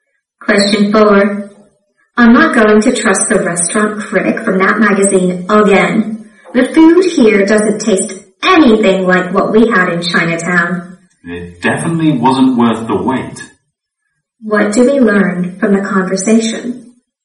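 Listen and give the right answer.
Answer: The restaurant was disappointing and not as good as the critic said.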